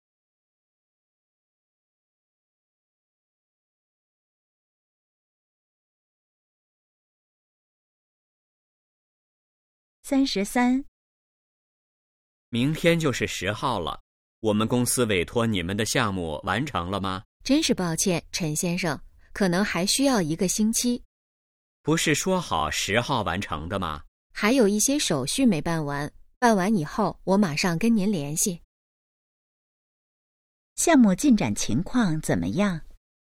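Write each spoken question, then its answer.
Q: 项目进展情况怎么样?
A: 还没完成,还需要一个星期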